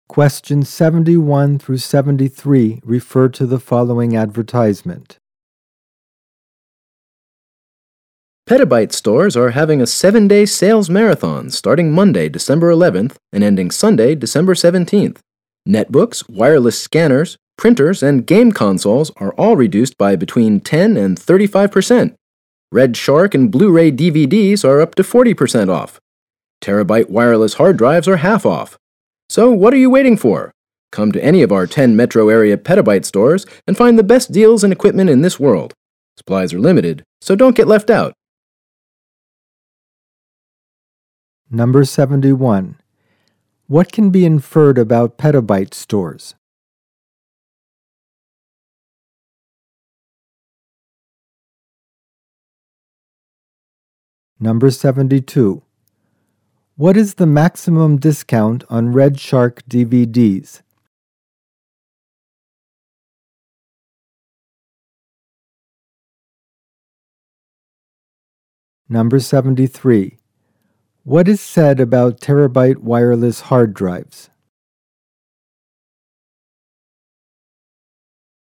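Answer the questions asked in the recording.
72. 40%
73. They are half off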